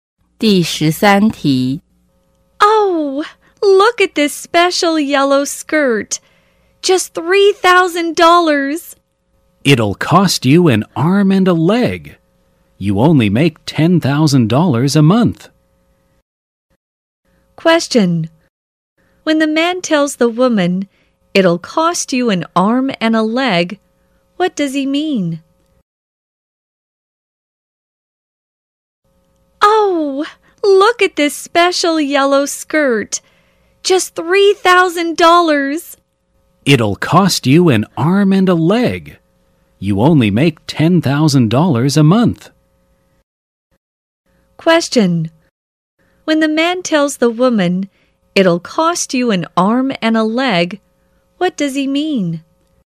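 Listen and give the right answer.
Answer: The skirt is too expensive for her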